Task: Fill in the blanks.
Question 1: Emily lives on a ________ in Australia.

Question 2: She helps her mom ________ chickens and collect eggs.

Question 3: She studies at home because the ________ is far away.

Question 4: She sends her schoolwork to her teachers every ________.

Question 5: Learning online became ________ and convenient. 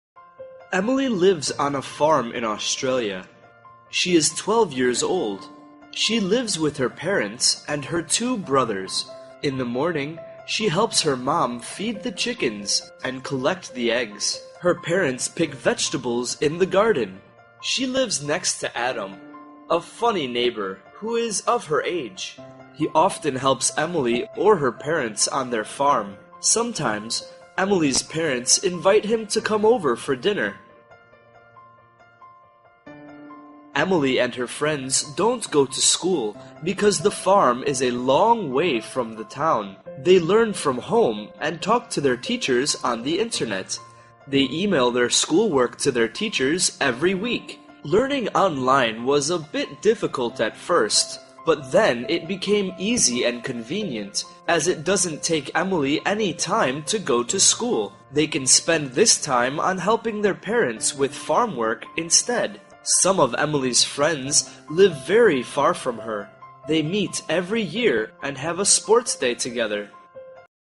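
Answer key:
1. farm
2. feed
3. town
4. week
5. easy

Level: lớp 8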